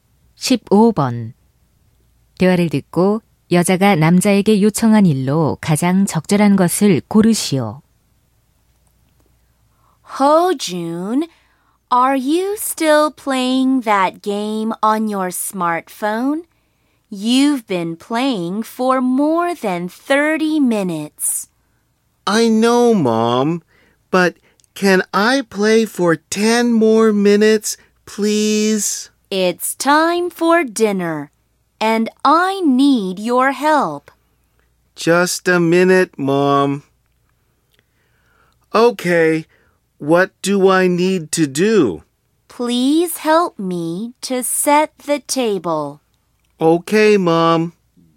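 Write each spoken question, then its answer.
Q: 대화를 듣고 여자가 남자에게 요청한 일로 가장 적절한 것을 고르시오.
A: 식탁 차리기 돕기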